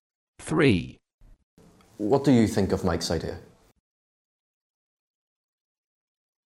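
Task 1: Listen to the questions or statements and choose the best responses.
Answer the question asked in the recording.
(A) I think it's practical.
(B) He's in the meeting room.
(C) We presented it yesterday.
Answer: (A) I think it's practical.

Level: A2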